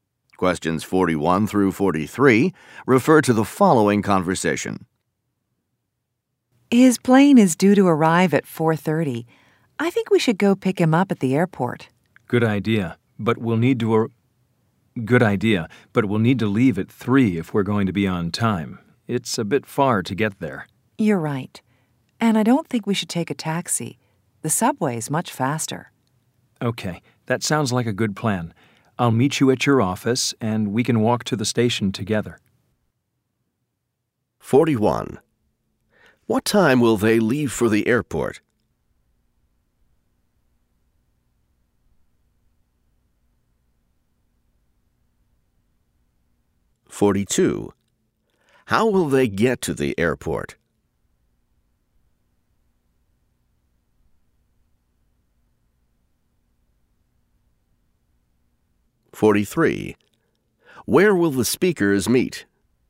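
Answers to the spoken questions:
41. At 3 o'clock
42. By subway
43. At the listener's office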